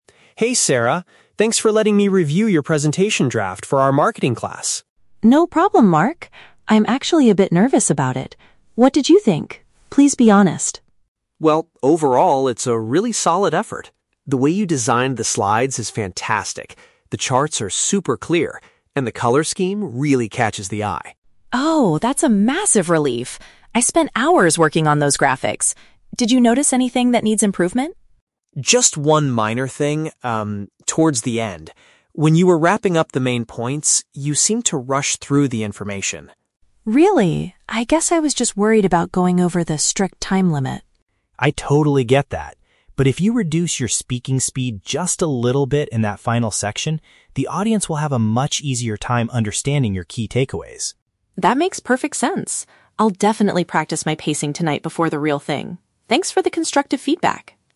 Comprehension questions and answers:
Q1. What does the man praise about the woman's presentation?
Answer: The visual elements.

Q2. What issue did the man identify in the presentation?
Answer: The speaker talked too fast at the end.

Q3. What does the woman plan to do next?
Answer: Work on the timing of her speech.

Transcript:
Mark: Hey Sarah, thanks for letting me review your presentation draft for our marketing class.
Sarah: No problem, Mark. I'm actually a bit nervous about it. What did you think? Please be honest!
Mark: Well, overall, it's a really solid effort. The way you designed the slides is fantastic. The charts are super clear, and the color scheme really catches the eye.
Sarah: Oh, that's a massive relief. I spent hours working on those graphics. Did you notice anything that needs improvement?
Mark: Just one minor thing, um... towards the end. When you were wrapping up the main points, you seemed to rush through the information.
Sarah: Really? I guess I was just worried about going over the strict time limit.
Mark: I totally get that. But if you reduce your speaking speed just a little bit in that final section, the audience will have a much easier time understanding your key takeaways.
Sarah: That makes perfect sense. I'll definitely practice my pacing tonight before the real thing. Thanks for the constructive feedback!